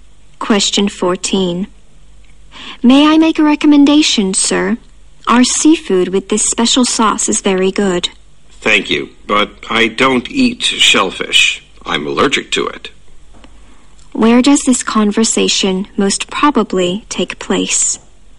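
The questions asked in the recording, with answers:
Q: Where does this conversation most probably take place?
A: In a restaurant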